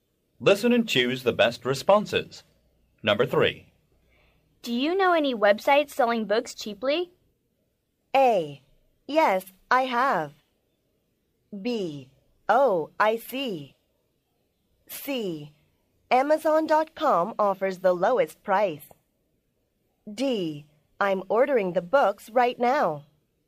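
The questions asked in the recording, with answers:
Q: Do you know any websites selling books cheaply?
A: C: Amazon.com offers the lowest price.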